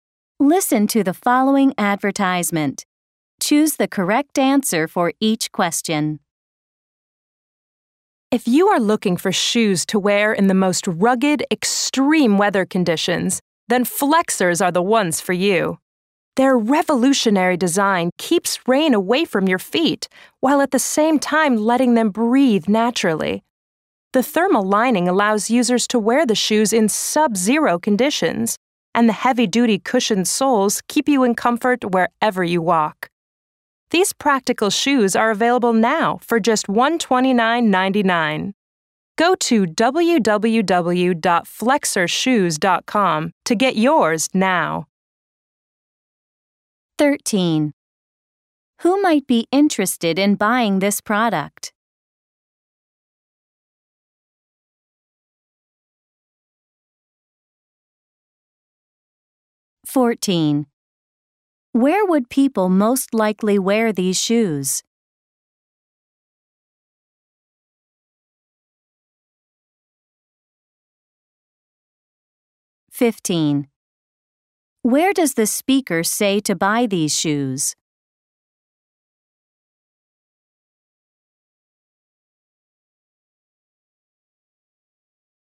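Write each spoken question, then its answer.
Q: Where does the speaker say to buy these shoes?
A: Online at www.flexershoes.com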